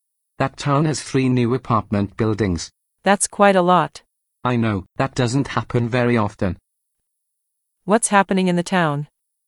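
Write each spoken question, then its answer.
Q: What's happening in the town?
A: It has 3 new apartment buildings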